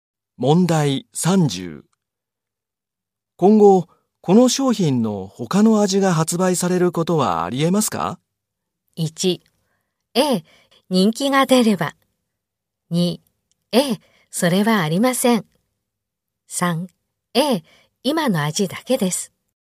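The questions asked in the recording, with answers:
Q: 今後、この商品の他の味が発売されることはありえますか?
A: 1: ええ、人気が出れば。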